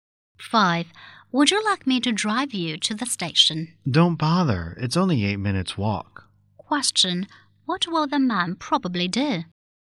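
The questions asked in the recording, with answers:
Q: What will the man probably do?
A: Walk to the station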